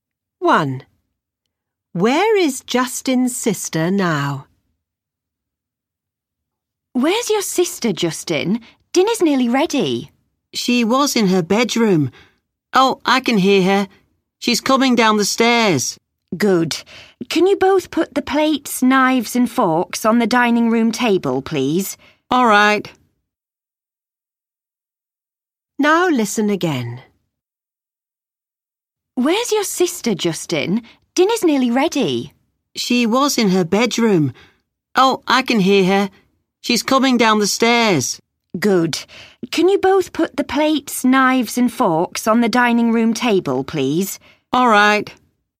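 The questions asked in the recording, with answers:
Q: Where is Justin's sister now?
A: On the stairs (coming down)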